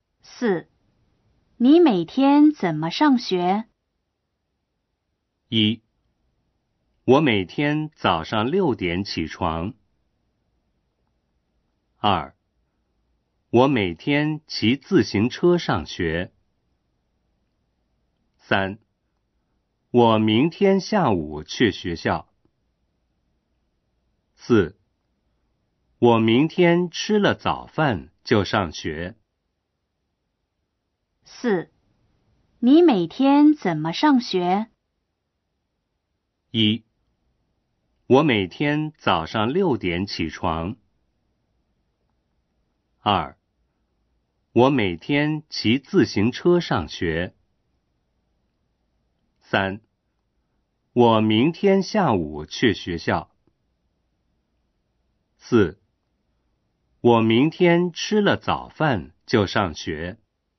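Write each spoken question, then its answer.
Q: 你每天怎么上学?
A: 二: 我每天骑自行车上学。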